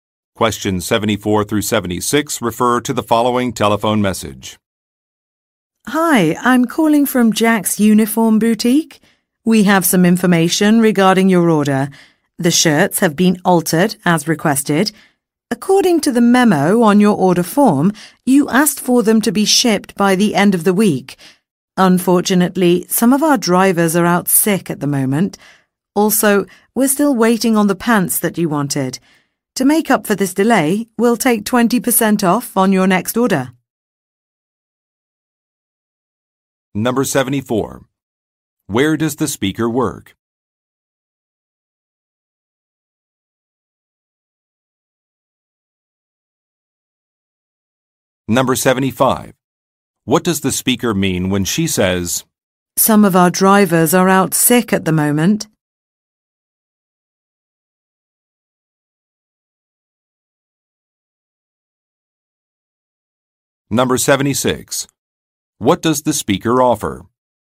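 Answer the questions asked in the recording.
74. At a uniform store (Jack's Uniform Boutique)
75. The order will not be shipped on time
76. 20% off the next order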